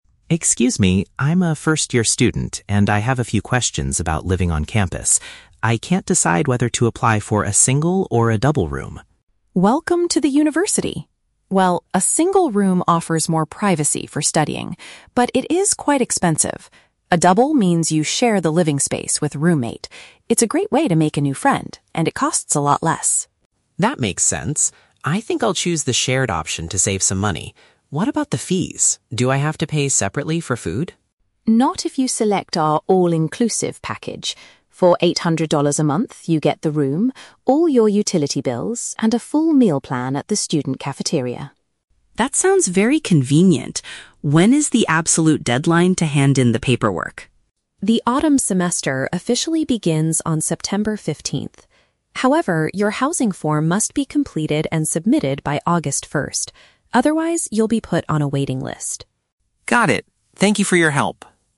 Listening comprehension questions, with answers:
Listen to a conversation between a student and a university staff member. Choose the correct answer (A, B, or C) for each question.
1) Why does Tom ultimately prefer the double room?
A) He wants a private area to concentrate on his studies.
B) He wants to spend less money on his accommodation.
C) He is hoping to meet a lot of new friends in the building.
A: B) He wants to spend less money on his accommodation.

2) What is provided in the all-inclusive monthly package?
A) The housing fee, but students must buy their own food.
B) A private bathroom and a shared student kitchen.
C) The bedroom, electricity, and daily meals.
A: C) The bedroom, electricity, and daily meals.

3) By what date must the student finish the housing application?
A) No later than the first of August.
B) Before he arrives for his first class on September 15th.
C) By tonight, before the rooms are completely full.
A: A) No later than the first of August.

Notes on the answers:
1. Tom says, "I think I'll choose the shared option to save some money." Option B paraphrases this accurately (spend less money = save some money; accommodation = shared option/room). Option A is the Trap: "Privacy for studying" is the benefit of the single room, which Tom does not choose. Option C is also a Trap: Linda mentions making a friend as a benefit, but Tom's stated reason is the cost.
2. Linda explains that the package covers "the room, all your utility bills, and a full meal plan". Option C uses synonyms to list these items (bedroom = room; electricity = utility bills; daily meals = full meal plan). Option A is the Trap: She says "Not if you select our all-inclusive package" in response to him asking if he has to pay separately for food. Option B is not mentioned.
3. Linda states clearly that the "housing form must be completed and submitted by August 1st". Option A matches this perfectly. Option B is the Trap: "September 15th" is mentioned, but that is when the "autumn semester officially begins", not the application deadline. Option C is a Trap: Tom might fill it out tonight in real life, but the official deadline from the university is August 1st.

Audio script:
Tom: Excuse me, I'm a first-year student and I have a few questions about living on campus. I can't decide whether to apply for a single or a double room.
Linda: Welcome to the university! Well, a single room offers more privacy for studying, but it is quite expensive. A double means you share the living space with a roommate. It's a great way to make a new friend, and it costs a lot less.
Tom: That makes sense. I think I'll choose the shared option to save some money. What about the fees? Do I have to pay separately for food?
Linda: Not if you select our all-inclusive package. For eight hundred dollars a month, you get the room, all your utility bills, and a full meal plan at the student cafeteria.
Tom: That sounds very convenient. When is the absolute deadline to hand in the paperwork?
Linda: The autumn semester officially begins on September 15th. However, your housing form must be completed and submitted by August 1st. Otherwise, you'll be put on a waiting list.

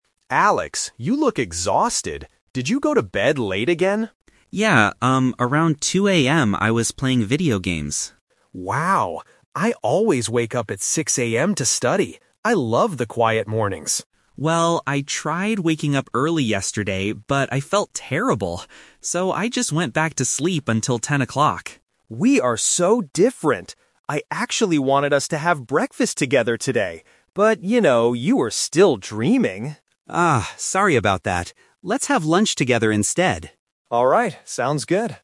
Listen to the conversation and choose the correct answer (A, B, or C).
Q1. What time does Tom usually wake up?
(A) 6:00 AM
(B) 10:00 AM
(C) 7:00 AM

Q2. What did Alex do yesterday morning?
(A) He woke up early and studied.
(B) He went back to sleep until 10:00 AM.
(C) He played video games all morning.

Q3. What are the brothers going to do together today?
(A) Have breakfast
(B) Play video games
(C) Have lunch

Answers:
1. (A) 6:00 AM
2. (B) He went back to sleep until 10:00 AM.
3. (C) Have lunch

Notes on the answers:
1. Tom says "I always wake up at 6:00 AM to study." Option B (10:00 AM) is a trap because that is the time his brother, Alex, woke up yesterday. Option C is not mentioned.
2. Alex says "I tried waking up early yesterday, but I felt terrible. So, I just went back to sleep until 10:00." Option A is a trap because he tried to wake up early but failed, and studying is Tom's habit, not Alex's. Option C is a trap because he played video games at night (2:00 AM), not in the morning.
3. Alex says "Let's have lunch together instead," and Tom agrees. Option A (Have breakfast) is a trap because Tom wanted to do this, but they couldn't because Alex was sleeping. Option B is just a detail about what Alex did last night, not a shared plan.

